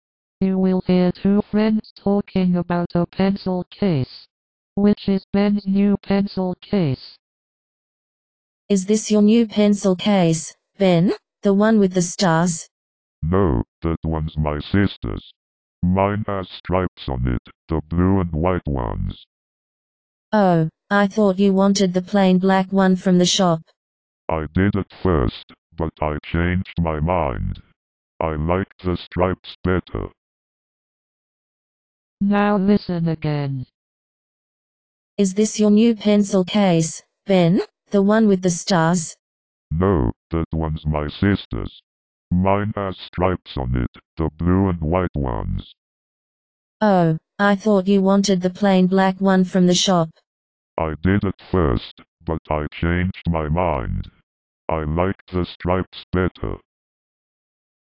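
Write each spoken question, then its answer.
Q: Which is Ben's new pencil case?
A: The blue and white striped one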